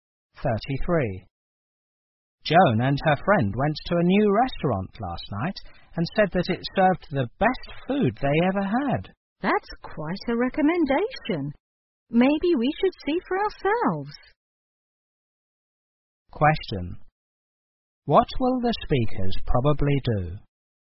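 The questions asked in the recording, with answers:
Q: What will the speakers probably do?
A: Try the new restaurant themselves.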